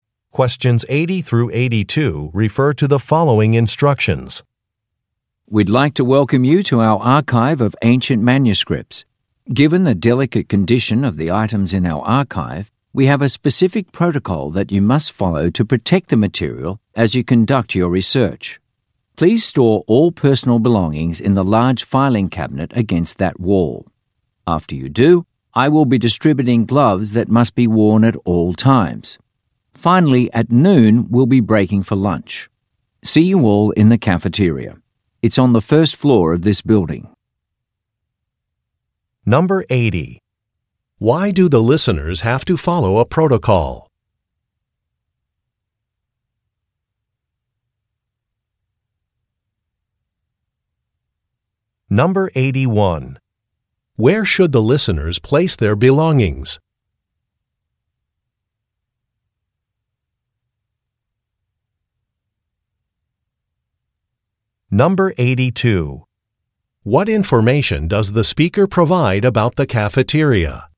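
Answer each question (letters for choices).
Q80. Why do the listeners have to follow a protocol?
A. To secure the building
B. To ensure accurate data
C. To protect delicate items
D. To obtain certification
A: C

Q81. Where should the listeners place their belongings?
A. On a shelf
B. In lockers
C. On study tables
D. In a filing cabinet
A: D

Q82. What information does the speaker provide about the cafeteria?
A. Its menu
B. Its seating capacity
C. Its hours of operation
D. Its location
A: D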